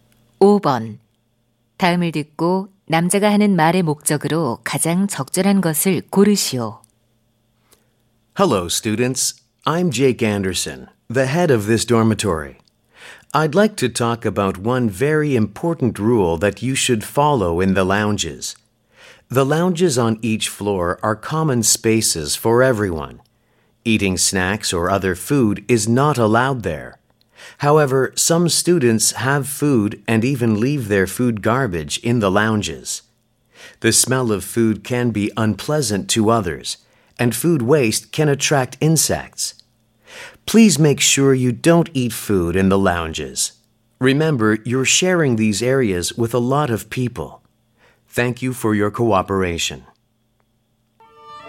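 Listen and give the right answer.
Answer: 라운지에서 음식을 먹지 말 것을 당부하려고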